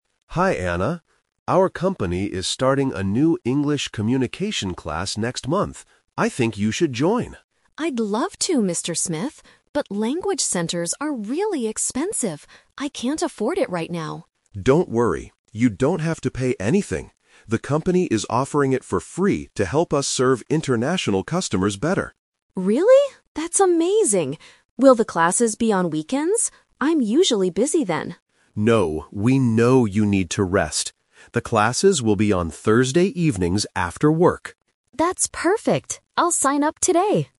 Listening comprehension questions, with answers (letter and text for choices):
Listen to the conversation and circle the correct answer (A, B, or C).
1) Why does Anna hesitate to take an English class at first?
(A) She thinks it costs too much money.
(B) She is too tired to study after work.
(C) She already speaks English well.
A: (A) She thinks it costs too much money.

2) Why is the company organizing this free class?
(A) To make extra money from employees.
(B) To serve international customers better.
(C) To prepare employees for a trip abroad.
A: (B) To serve international customers better.

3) When will the English classes take place?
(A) On weekends.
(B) On Thursday evenings.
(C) On Monday mornings.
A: (B) On Thursday evenings.

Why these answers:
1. Anna says, "language centers are really expensive. I can't afford it right now." This is her initial worry. Why the trap is wrong: Option (B) is the trap. The audio mentions the class is "after work," but Anna says "That's perfect," meaning she is not too tired to do it. Option (C) was not mentioned.
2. Mr. Smith states the company's goal clearly: "The company is offering it for free to help us serve international customers better." Why the trap is wrong: Option (A) is the trap. The words "pay" and "expensive" are mentioned, but the class is completely free, so the company is not making money from it. Option (C) is a plausible guess but was not mentioned.
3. Mr. Smith confirms the schedule: "The classes will be on Thursday evenings after work." Why the trap is wrong: Option (A) is the trap (The Twist). Anna asks if the classes will be on weekends, but Mr. Smith says "No, we know you need to rest." Option (C) was not mentioned.

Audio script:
Mr. Smith: Hi Anna. Our company is starting a new English communication class next month. I think you should join.
Anna: I'd love to, Mr. Smith. But language centers are really expensive. I can't afford it right now.
Mr. Smith: Don't worry. You don't have to pay anything. The company is offering it for free to help us serve international customers better.
Anna: Really? That's amazing! Will the classes be on weekends? I'm usually busy then.
Mr. Smith: No, we know you need to rest. The classes will be on Thursday evenings after work.